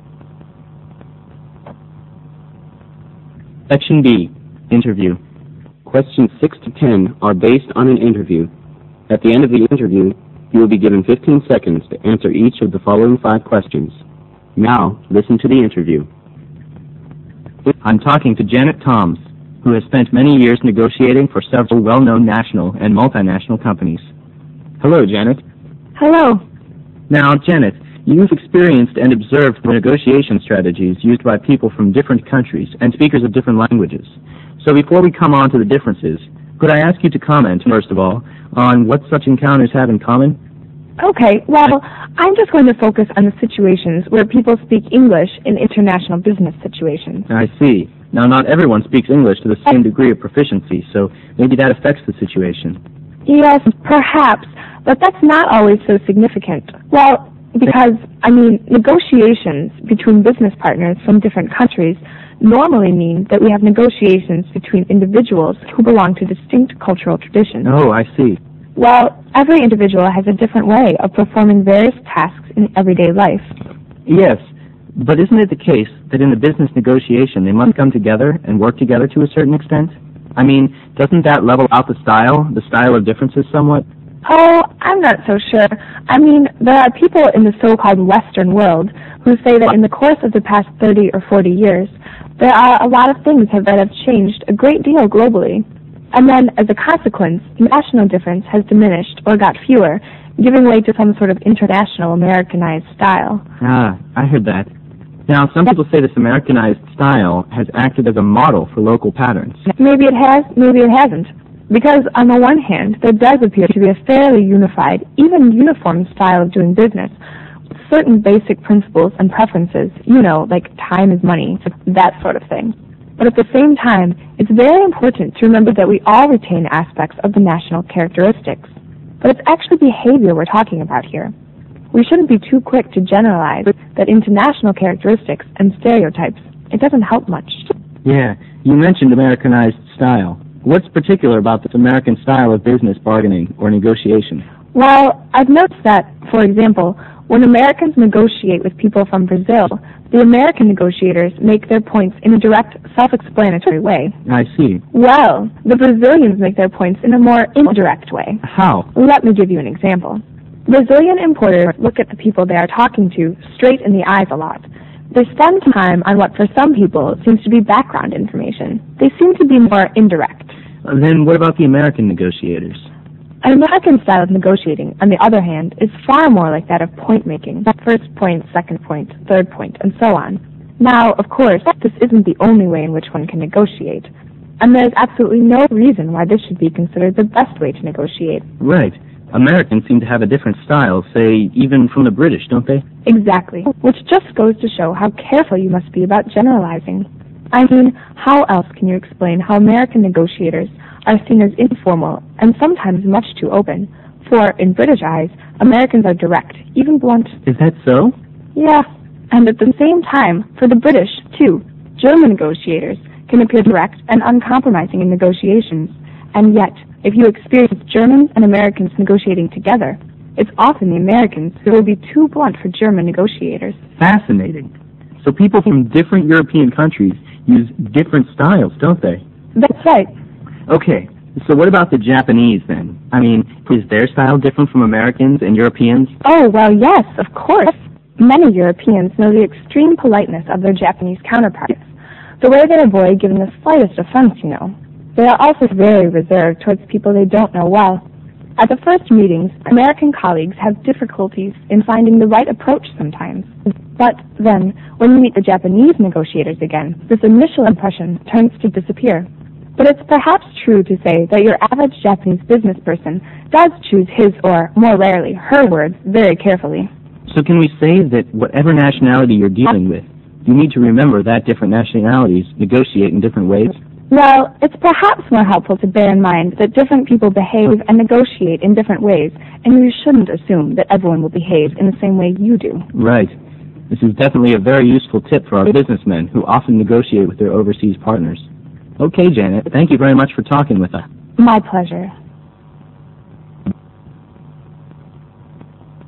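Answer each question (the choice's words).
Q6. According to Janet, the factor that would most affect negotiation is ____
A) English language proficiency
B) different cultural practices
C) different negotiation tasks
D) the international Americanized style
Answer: different cultural practices

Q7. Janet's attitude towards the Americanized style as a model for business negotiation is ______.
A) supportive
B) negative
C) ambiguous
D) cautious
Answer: cautious

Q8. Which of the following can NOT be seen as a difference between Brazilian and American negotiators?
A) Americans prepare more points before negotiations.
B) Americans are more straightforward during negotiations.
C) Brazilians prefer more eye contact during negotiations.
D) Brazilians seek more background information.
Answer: Americans prepare more points before negotiations.

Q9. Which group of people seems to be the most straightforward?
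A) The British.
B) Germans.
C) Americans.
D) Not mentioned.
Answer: Americans.

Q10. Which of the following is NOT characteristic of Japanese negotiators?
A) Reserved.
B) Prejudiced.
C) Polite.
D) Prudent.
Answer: Prejudiced.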